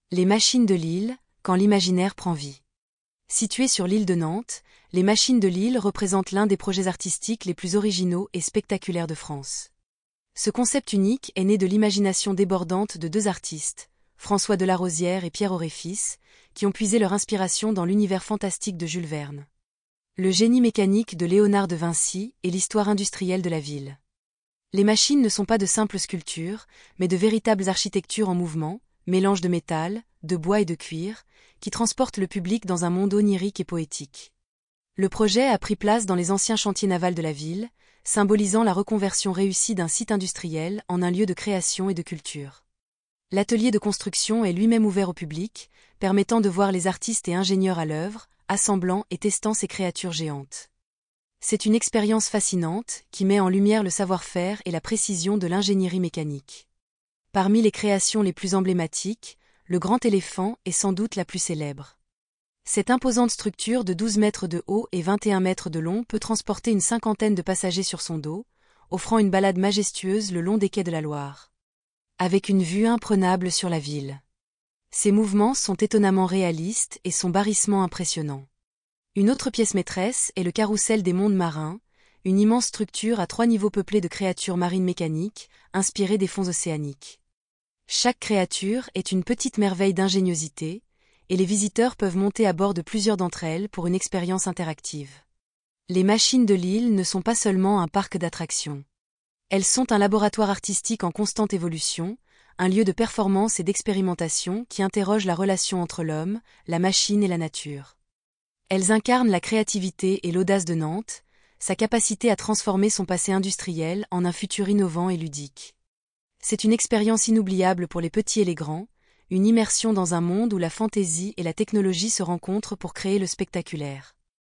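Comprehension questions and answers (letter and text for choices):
Écoutez l'enregistrement et cochez la bonne réponse.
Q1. Qui sont les créateurs des Machines de l'Île ?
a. Un seul artiste inconnu.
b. François Delarozière et Pierre Orefice.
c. Jules Verne et Léonard de Vinci.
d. Des ingénieurs automobiles.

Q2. Quelles sont les principales sources d'inspiration des Machines de l'Île ?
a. L'architecture antique et les contes de fées.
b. Jules Verne, Léonard de Vinci et l'histoire industrielle.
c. La science-fiction et les robots futuristes.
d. Les animaux de la ferme et la nature sauvage.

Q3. Sur quel ancien site industriel les Machines de l'Île sont-elles construites ?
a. Une ancienne usine de biscuits.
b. Des anciens chantiers navals.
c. Une ancienne conserverie.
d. Une ancienne gare ferroviaire.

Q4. Quelle est la caractéristique principale du Grand Éléphant ?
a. Il est immobile et sert de décoration.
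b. Il est petit et ne peut pas transporter de passagers.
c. Il est une structure imposante qui peut transporter des passagers.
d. Il est une machine à laver géante.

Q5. Quel est le thème du Carrousel ?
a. Les oiseaux et les insectes.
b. Les créatures terrestres.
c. Les véhicules volants.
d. Les créatures marines.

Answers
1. b. François Delarozière et Pierre Orefice.
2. b. Jules Verne, Léonard de Vinci et l'histoire industrielle.
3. b. Des anciens chantiers navals.
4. c. Il est une structure imposante qui peut transporter des passagers.
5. d. Les créatures marines.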